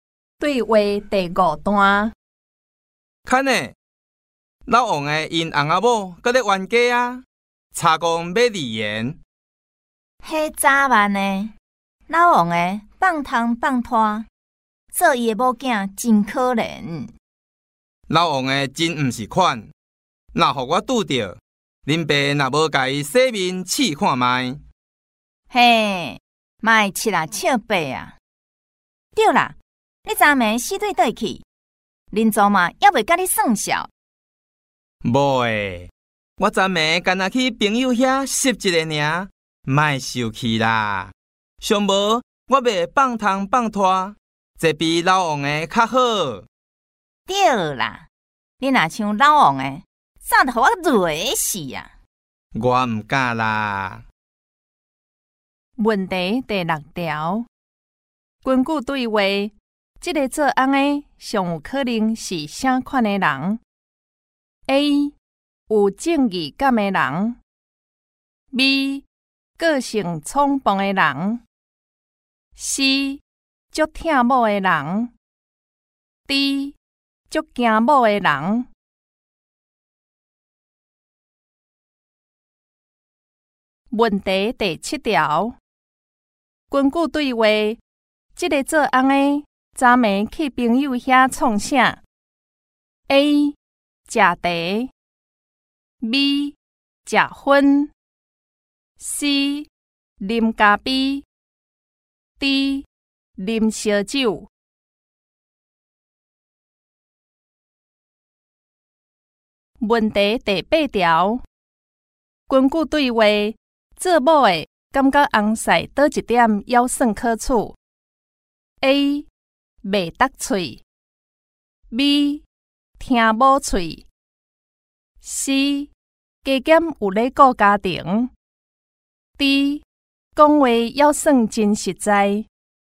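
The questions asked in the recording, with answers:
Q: 根据对话,这个做翁的上有可能是什么的人?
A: D: 很惊某的人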